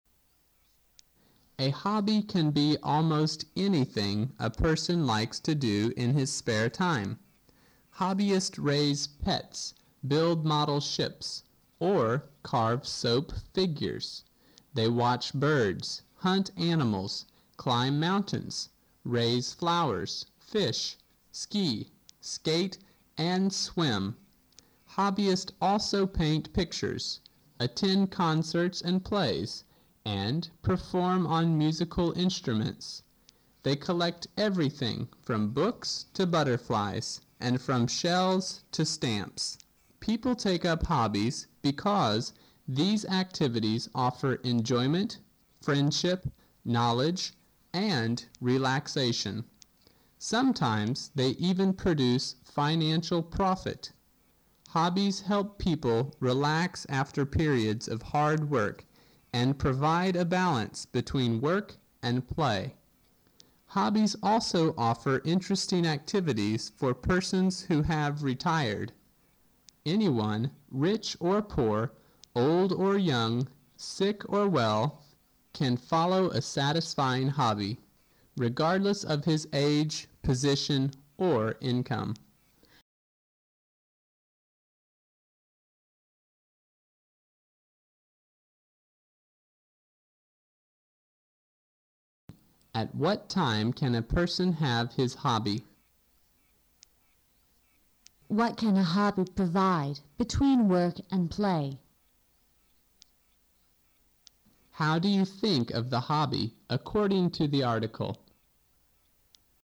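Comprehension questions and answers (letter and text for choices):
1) What can a hobby provide between work and play?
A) Balance.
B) Enjoyment.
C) Relaxation.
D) Friendship.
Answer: A) Balance.

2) How do you think of the hobby according to the article?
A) it is useful.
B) It is harmful.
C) It is a waste of time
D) It is unnecessary.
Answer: A) it is useful.

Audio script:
[听力原文]13-15 A hobby can be almost anything a person likes to do in his spare time. Hobbyists raise pets, build model ships, or carve soap figures, They watch birds, hunt animals, climb mountains, raise flowers, fish, ski, skate, and swim. Hobbyists also paint paint pictures, attend concerts and plays, and perform on musical instruments. They collect everything from books to butterflies, and from shells to stamps. People take up hobbies because these activities offer enjoyment, friendship, knowledge, and relaxation. Sometimes they even produce financial profit. 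Hobbies help people relax after periods of hard work, and provide a balance between work and play. Hobbies also offer interesting activities for persons who have retired. Anyone, rich or poor, old or young, sick or well, can follow a satisfying hobby, regardless of his age, position, or income. At what time can a person have his hobby?
[听力原文] What can a hobby provide between work and play?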